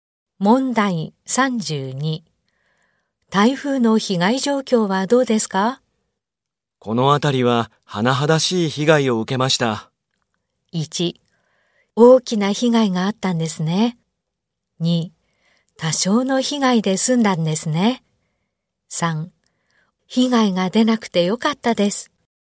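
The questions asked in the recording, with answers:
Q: 台風の被害状況はどうですか?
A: 1: 大きな被害があったんですね。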